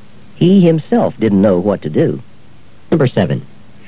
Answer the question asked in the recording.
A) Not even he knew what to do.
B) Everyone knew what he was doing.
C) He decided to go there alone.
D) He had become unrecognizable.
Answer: A) Not even he knew what to do.

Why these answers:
He himself didn't know what to do.

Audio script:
5. I found that poem hard to understand, didn't you?
6. He himself didn't know what to do.